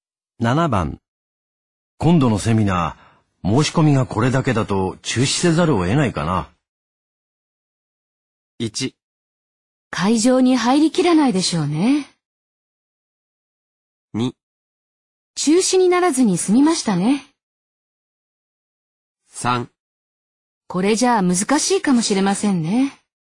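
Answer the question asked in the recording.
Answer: 3: これじゃ難しいかもしれませんね。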